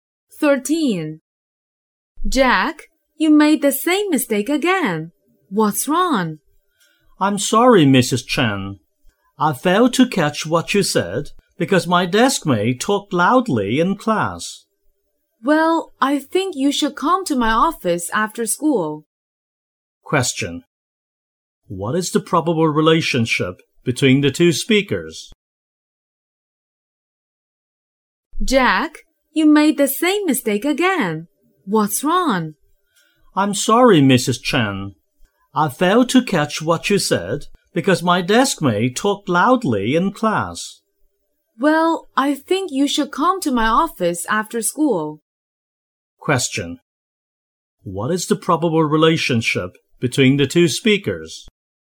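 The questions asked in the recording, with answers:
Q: What is the probable relationship between the two speakers?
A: Teacher and student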